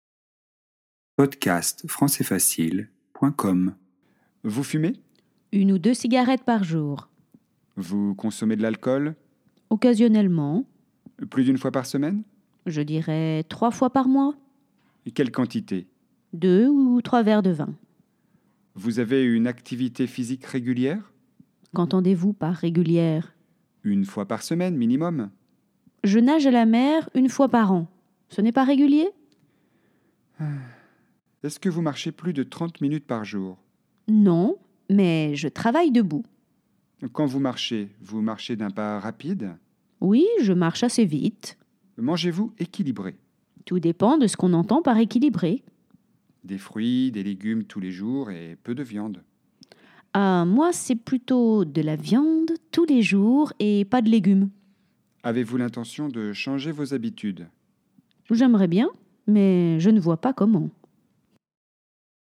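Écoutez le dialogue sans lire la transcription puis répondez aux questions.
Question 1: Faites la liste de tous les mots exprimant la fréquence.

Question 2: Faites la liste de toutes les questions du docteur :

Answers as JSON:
{"1": "une ou deux par jour, occasionnellement, une fois par semaine, trois fois par mois, une fois par an, 30 minutes par jour, tous les jours", "2": "Vous fumez ? Vous consommez de l'alcool ? Plus d'une fois par semaine ? Quelle quantité ? Vous avez une activité physique régulière ? Est-ce que vous marchez plus de 30 minutes par jour ? Quand vous marchez, vous marchez d'un pas rapide ? Mangez-vous équilibré ? Avez-vous l'intention de changer vos habitudes ?"}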